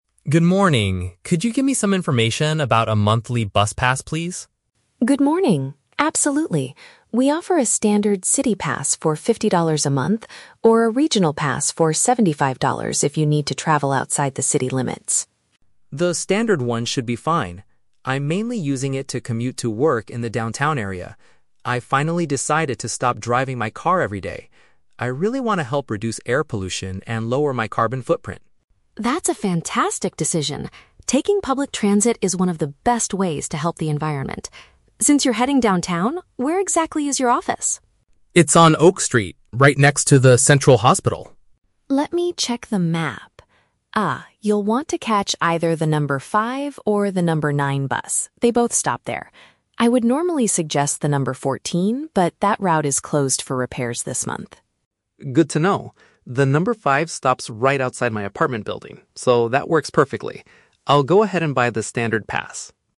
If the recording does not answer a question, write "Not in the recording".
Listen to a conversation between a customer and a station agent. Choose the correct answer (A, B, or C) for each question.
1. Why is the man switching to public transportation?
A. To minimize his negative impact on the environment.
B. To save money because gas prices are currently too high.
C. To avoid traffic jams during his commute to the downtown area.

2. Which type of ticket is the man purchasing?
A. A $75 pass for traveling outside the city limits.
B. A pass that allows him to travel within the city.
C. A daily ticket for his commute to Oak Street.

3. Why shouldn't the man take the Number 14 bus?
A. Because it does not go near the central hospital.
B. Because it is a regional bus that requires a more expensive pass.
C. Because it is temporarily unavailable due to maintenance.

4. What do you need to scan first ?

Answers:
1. To minimize his negative impact on the environment.
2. A pass that allows him to travel within the city.
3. Because it is temporarily unavailable due to maintenance.
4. Not in the recording

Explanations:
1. Mark says he wants to "help reduce air pollution and lower my carbon footprint." (Paraphrasing: minimize negative impact = reduce air pollution / lower carbon footprint). Why the trap is wrong: Options (B) and (C) are traps. Saving money and avoiding traffic are very logical real-world reasons for taking the bus, but Mark does not mention them in the audio. Kỹ năng B1 yêu cầu học viên phải dựa vào đúng dữ kiện bài nghe, không suy diễn cá nhân.
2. Mark chooses the "standard one" ($50) because he is commuting to the "downtown area" (inside the city). Why the trap is wrong: Option (A) is a trap. The $75 regional pass is mentioned by the agent, but Mark rejects it because he doesn't need to travel outside the city limits. Option (C) is a trap because he specifically asked for a monthly bus pass at the beginning of the conversation, not a daily ticket.
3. Anna advises him not to take the Number 14 because that route is "closed for repairs this month." (Paraphrasing: temporarily unavailable = closed this month; maintenance = repairs). Why the trap is wrong: Option (A) is a trap. Anna says she "would normally suggest" it, which implies it usually does go near the hospital, but currently cannot. Option (B) is unmentioned information.

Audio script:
Mark: Good morning. Could you give me some information about a monthly bus pass, please?
Anna: Good morning! Absolutely. We offer a standard city pass for $50 a month, or a regional pass for $75 if you need to travel outside the city limits.
Mark: The standard one should be fine. I'm mainly using it to commute to work in the downtown area. I've finally decided to stop driving my car every day. I really want to help reduce air pollution and lower my carbon footprint.
Anna: That's a fantastic decision. Taking public transit is one of the best ways to help the environment. Since you're heading downtown, where exactly is your office?
Mark: It's on Oak Street, right next to the central hospital.
Anna: Let me check the map. Ah, you'll want to catch either the Number 5 or the Number 9 bus. They both stop there. I would normally suggest the Number 14, but that route is closed for repairs this month.
Mark: Good to know. The Number 5 stops right outside my apartment building, so that works perfectly. I'll go ahead and buy the standard pass.

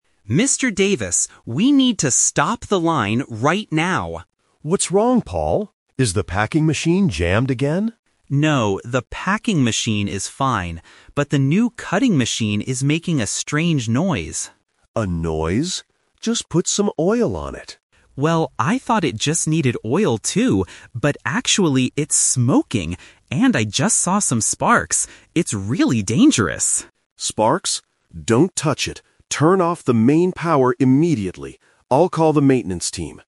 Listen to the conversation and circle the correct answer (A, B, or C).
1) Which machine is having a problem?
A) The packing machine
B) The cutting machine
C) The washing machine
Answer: The cutting machine

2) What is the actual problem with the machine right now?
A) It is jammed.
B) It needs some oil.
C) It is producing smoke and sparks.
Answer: It is producing smoke and sparks.

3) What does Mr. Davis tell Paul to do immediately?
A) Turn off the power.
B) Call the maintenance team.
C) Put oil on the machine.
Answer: Turn off the power.

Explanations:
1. Paul clearly states, "the new cutting machine is making a strange noise." Option (A) is a trap because the foreman asks if the packing machine is jammed, but Paul says it is fine. Option (C) is not mentioned.
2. This question features the "Twist". The foreman asks if it is jammed (Option A - Trap). Then, both of them initially thought it just needed oil because of the noise (Option B - Trap). However, Paul confirms the real danger: "actually, it's smoking! And I just saw some sparks."
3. Mr. Davis commands, "Turn off the main power immediately." Option (B) is a trap because Mr. Davis says he will call the maintenance team, not Paul. Option (C) was an old suggestion before he knew about the sparks.

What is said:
Paul (Worker): Mr. Davis, we need to stop the line right now!
Mr. Davis (Foreman): What's wrong, Paul? Is the packing machine jammed again?
Paul: No, the packing machine is fine. But the new cutting machine is making a strange noise.
Mr. Davis: A noise? Just put some oil on it.
Paul: Well, I thought it just needed oil too, but actually, it's smoking! And I just saw some sparks. It's really dangerous.
Mr. Davis: Sparks? Don't touch it. Turn off the main power immediately. I'll call the maintenance team.

